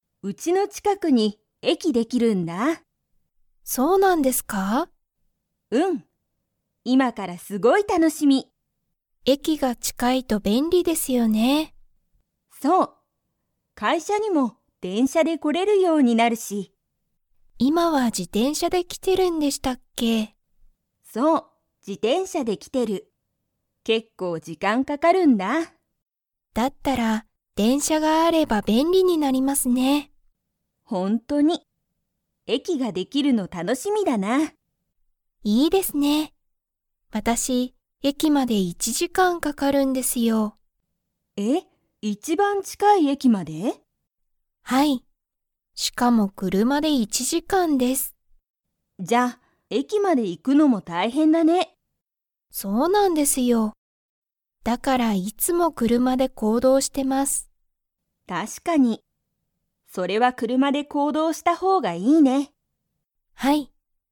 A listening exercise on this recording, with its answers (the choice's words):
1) ゆきは今いま、 で会社かいしゃに来きている。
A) 自転車じてんしゃ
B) 車くるま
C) 電車でんしゃ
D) バス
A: 自転車じてんしゃ

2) さちは、いつも電車でんしゃで行動こうどうしていますか?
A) はい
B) いいえ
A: いいえ

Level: Level 3